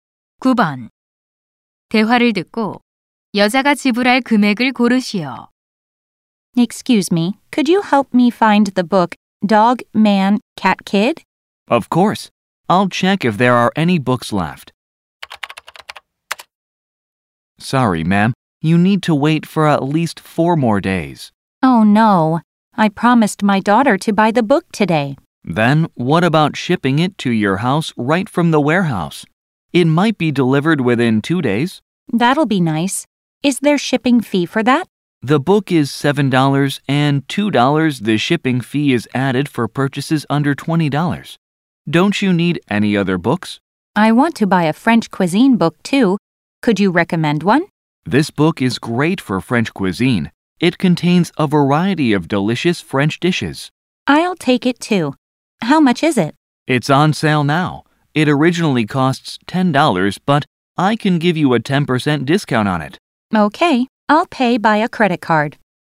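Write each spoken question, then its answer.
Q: 대화를 듣고 여자가 지불할 금액을 고르시오.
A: $18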